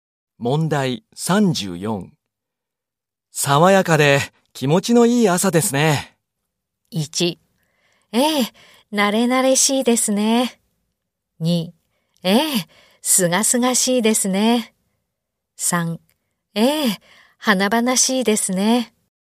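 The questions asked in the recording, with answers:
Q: 爽やかで気持ちのいい朝ですね。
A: 2: ええ、すがすがしいですね。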